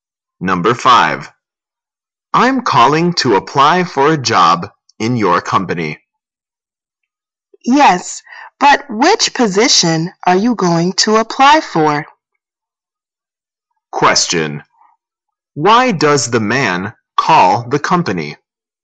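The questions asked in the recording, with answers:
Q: Why does the man call the company?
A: To apply for a job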